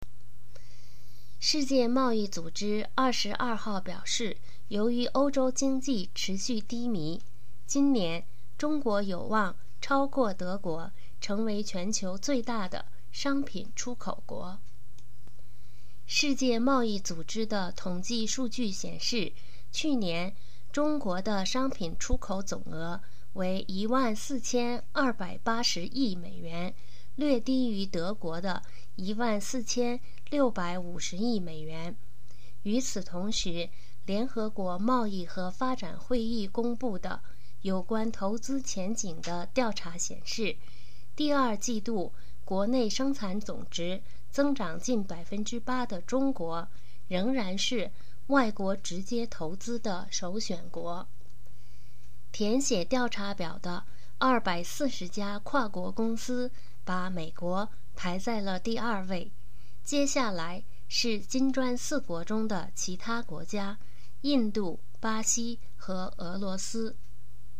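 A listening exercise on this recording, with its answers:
Please answer the following questions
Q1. 目前世界第一大商品出口国是哪国?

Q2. 去年中国的商品出口总额是多少?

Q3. 中国第二季度国内生产总值的增长是多少?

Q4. "金砖四国"指的是哪些国家?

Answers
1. 德国
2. 14280亿美元
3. 近8%
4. 中国、印度、巴西和俄罗斯

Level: M.Phil Year 2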